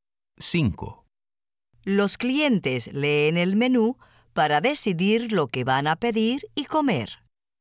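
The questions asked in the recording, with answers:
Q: Los clientes leen el menú para decidir lo que van a pedir y comer.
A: Sí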